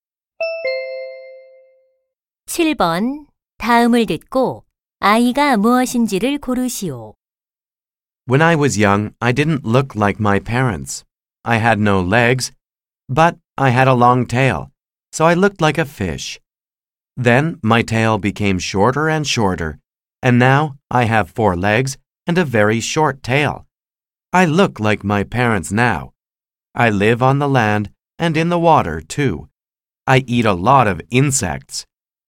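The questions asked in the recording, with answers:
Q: 다음을 듣고 아이가 무엇인지를 고르시오.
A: 개구리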